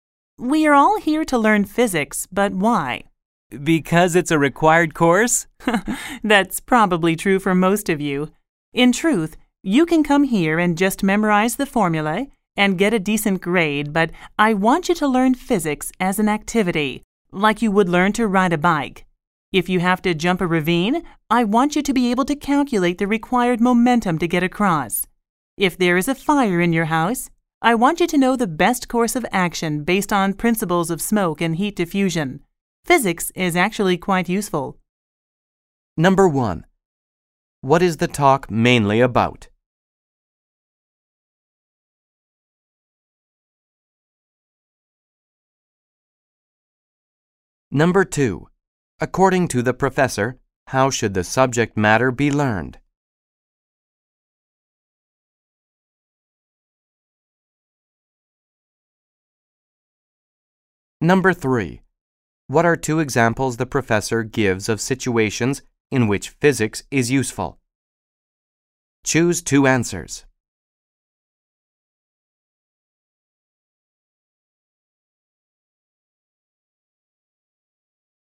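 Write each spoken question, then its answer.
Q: According to the professor, how should the subject matter be learned?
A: As an activity, like learning to ride a bike, not by memorizing formulae

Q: What are two examples the professor gives of situations in which physics is useful? Choose two answers.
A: Jumping a ravine (calculating the momentum needed) and a house fire (using principles of smoke and heat diffusion)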